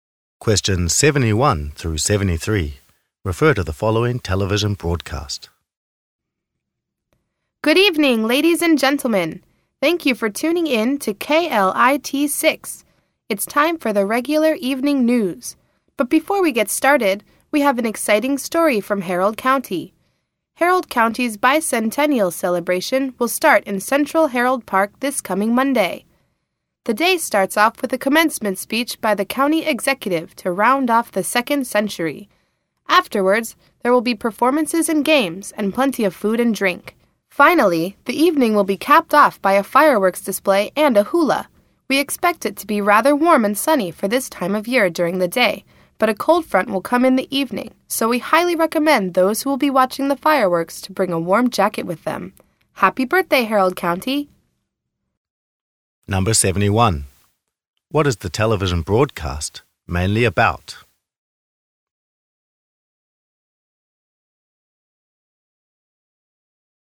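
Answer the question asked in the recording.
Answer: Harold County's bicentennial celebration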